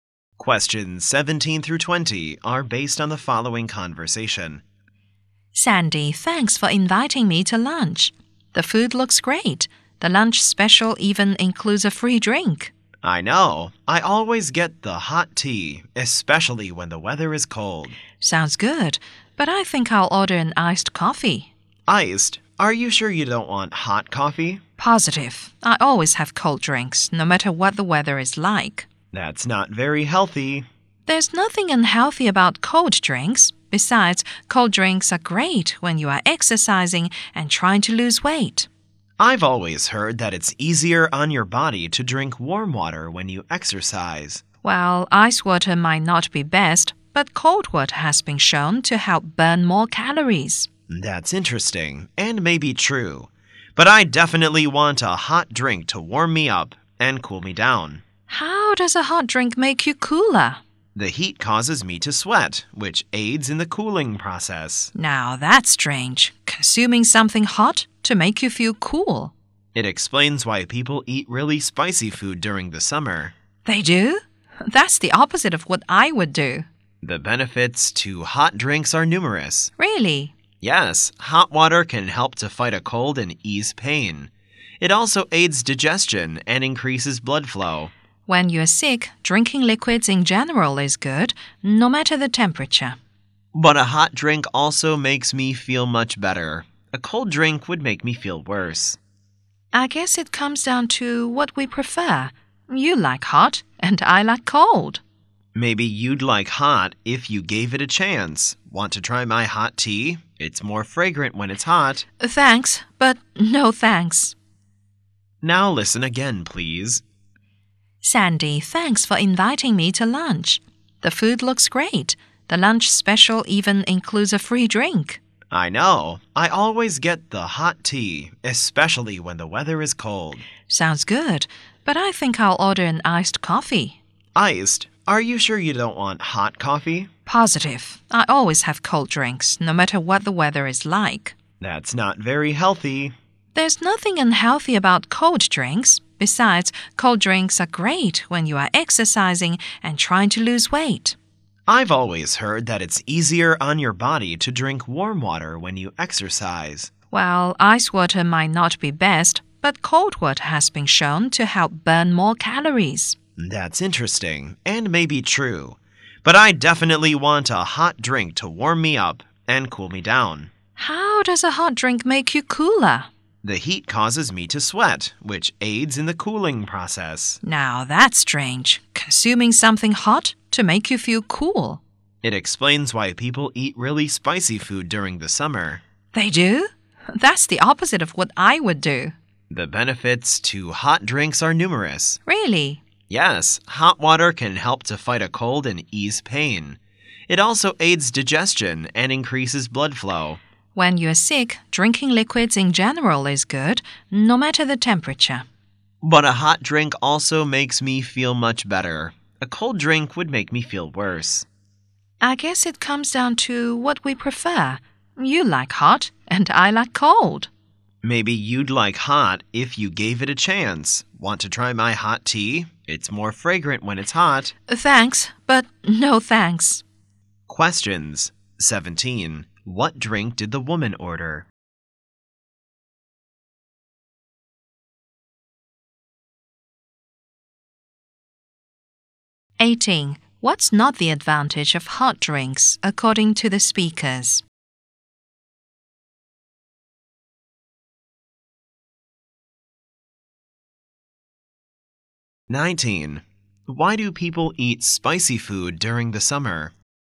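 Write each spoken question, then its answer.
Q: Why do people eat spicy food during the summer?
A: It makes them sweat, which cools them down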